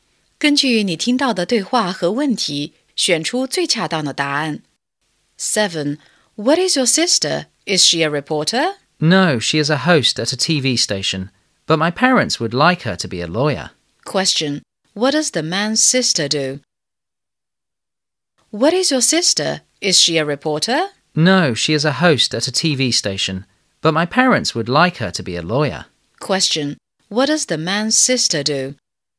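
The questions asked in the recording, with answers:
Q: What does the man's sister do?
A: She is a host at a TV station.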